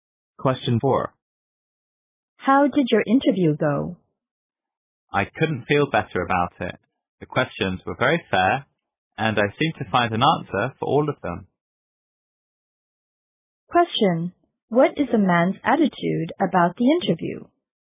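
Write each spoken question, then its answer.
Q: What is a man's attitude about the interview?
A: He feels very confident and pleased about it.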